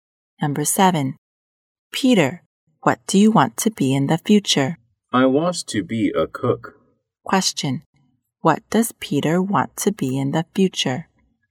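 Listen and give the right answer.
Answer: A cook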